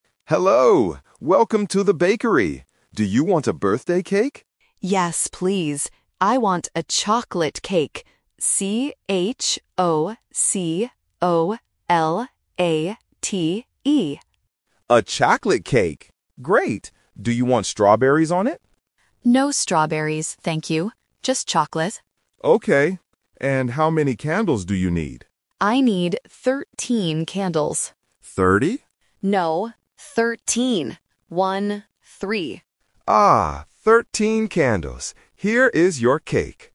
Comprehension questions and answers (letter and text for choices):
Listen to the conversation at a bakery and choose the correct answer (A, B, or C) for each question.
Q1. What kind of cake does the customer want?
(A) Vanilla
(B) Strawberry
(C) Chocolate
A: (C) Chocolate

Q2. How does the customer spell the flavor of the cake?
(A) C-H-O-C-O-L-A-T-E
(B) C-H-O-K-O-L-A-T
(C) C-H-O-C-L-A-T-E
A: (A) C-H-O-C-O-L-A-T-E

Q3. How many candles does the customer need?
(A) 3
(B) 13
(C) 30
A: (B) 13

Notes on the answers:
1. The customer explicitly says, "I want a chocolate cake." Option (B) Strawberry is The Trap: the baker asks if she wants strawberries on it, but she says "No strawberries, thank you." Option (A) Vanilla is not mentioned in the audio.
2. The customer spells the word for the cake flavor very clearly: "C-H-O-C-O-L-A-T-E". Options (B) and (C) are incorrect spellings.
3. The customer says she needs "thirteen" candles and confirms it by saying "One, three." Option (C) 30 is The Trap: the baker mishears and asks "Thirty?", but the customer corrects him. Option (A) 3 is a distractor with a similar sound.

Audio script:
Baker: Hello! Welcome to the bakery. Do you want a birthday cake?
Customer: Yes, please. I want a chocolate cake. C-H-O-C-O-L-A-T-E.
Baker: A chocolate cake. Great! Do you want strawberries on it?
Customer: No strawberries, thank you. Just chocolate.
Baker: Okay. And how many candles do you need?

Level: A1